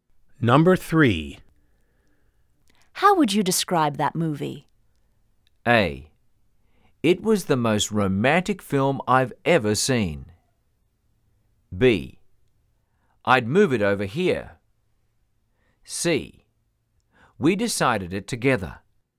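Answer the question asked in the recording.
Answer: A: It was the most romantic film I've ever seen.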